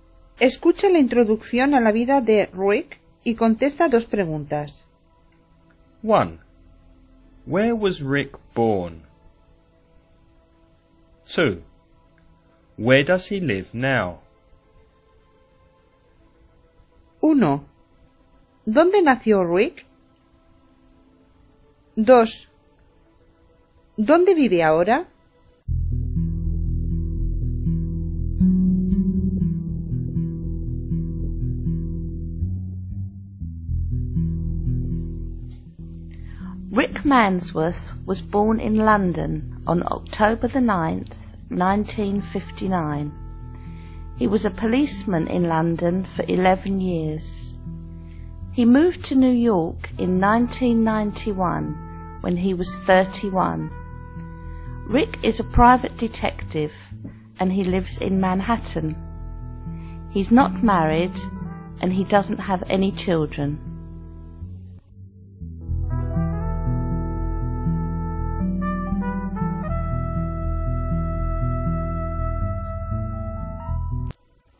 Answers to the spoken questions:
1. He was born in London.
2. He lives in Manhattan, New York.